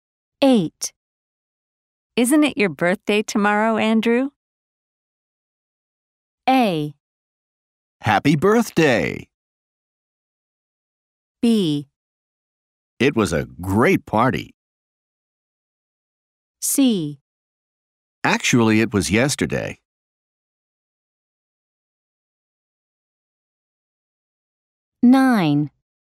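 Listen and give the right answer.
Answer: C: Actually, it was yesterday.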